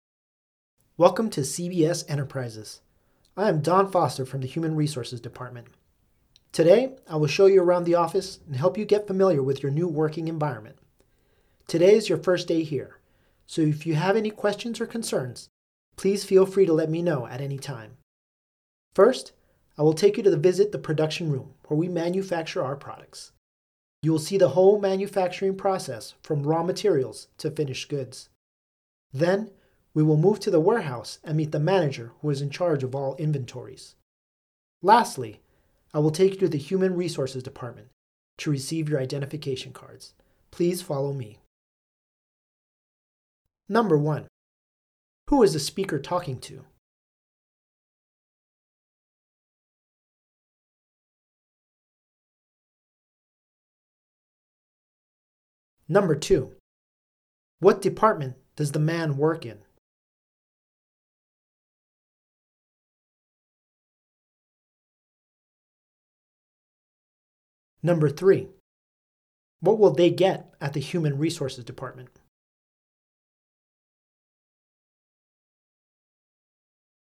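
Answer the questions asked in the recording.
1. New employees
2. Human Resources Department
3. Identification cards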